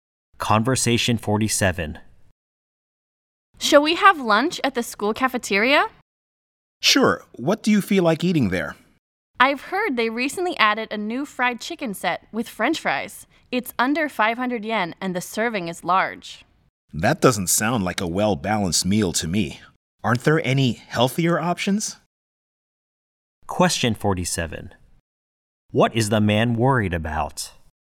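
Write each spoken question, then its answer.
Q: What is the man worried about?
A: The meal is not healthy or well-balanced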